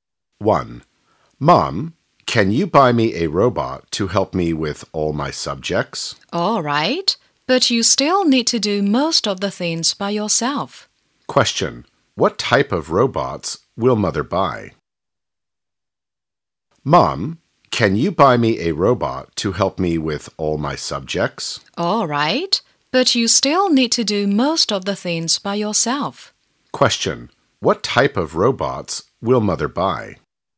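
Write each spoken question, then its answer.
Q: What type of robots will mother buy?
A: A robot that helps with all school subjects (a study robot)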